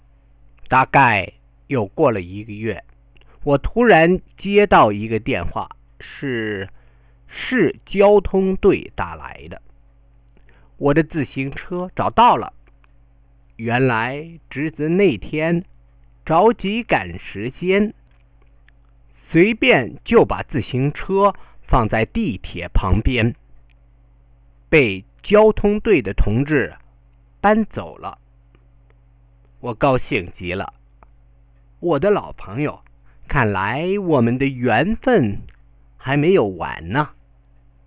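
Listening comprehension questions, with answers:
How was the bike was found in the end? 20%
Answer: About a month later, the city traffic police called him. His nephew had left the bike next to the subway in a hurry, and the traffic police had taken it away.

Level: Second year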